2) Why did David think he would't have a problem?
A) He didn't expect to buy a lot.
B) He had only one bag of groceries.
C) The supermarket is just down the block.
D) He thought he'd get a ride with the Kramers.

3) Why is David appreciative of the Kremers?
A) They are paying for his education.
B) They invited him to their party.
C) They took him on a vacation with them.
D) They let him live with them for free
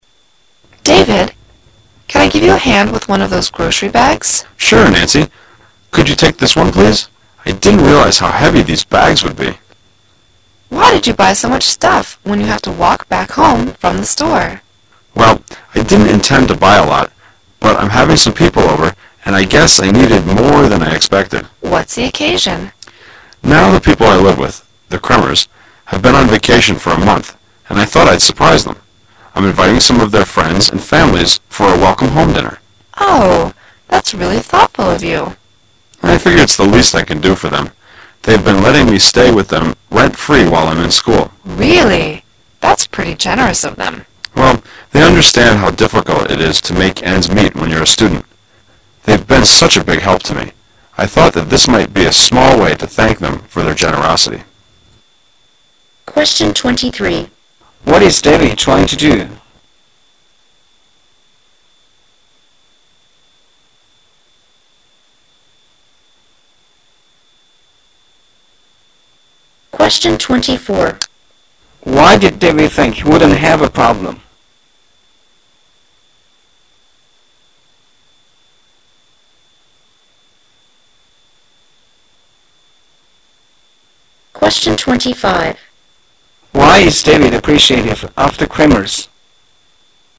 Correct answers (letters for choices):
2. A
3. D

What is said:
[解析] 23-25 W: David, can I give you a hand with one of those grocery bags? M: Sure, Nancy. Could you take this one please? I didn't realize how heavy these bags would be. W: Why did you buy so much stuff when you have to walk back home from the store? M: Well, I didn't intend to buy a lot. But I'm having some people over, and I guess I needed more than I expected. W: What's the occasion? M: Now the people ! live with, the Kremers, have been on vacation for a month and I thought I'd surprise them. I'm inviting some of their friends and families for a welcome home dinner. W: Oh, that's really thoughtful of you. M: I figure it's the least I can do for them. They've been letting me stay with them rent-free while I'm in school. W: Really? That's pretty generous of them. M: Well, they understand how difficult it is to make ends meet when you're a student. They've been such a big help to me. I thought that this might be a small way to thank them for their generosity. What is David trying to do?